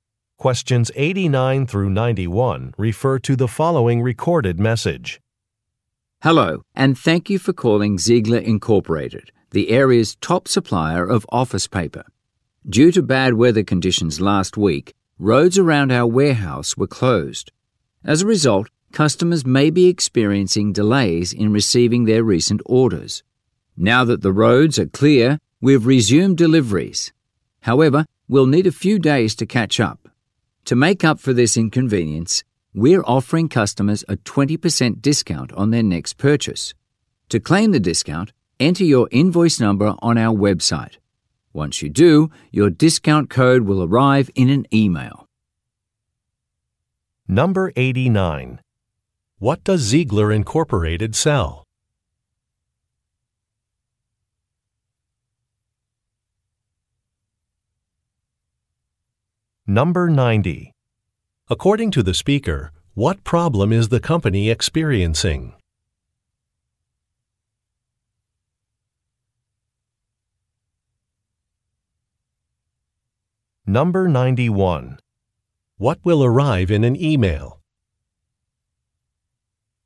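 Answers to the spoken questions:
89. Office paper
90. Delivery delays
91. A discount code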